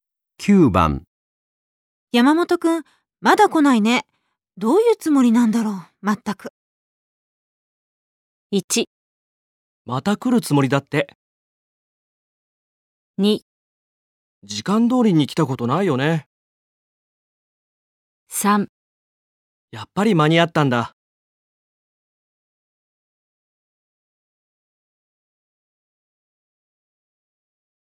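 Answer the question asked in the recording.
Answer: 2: 時間通りに来たことないよね。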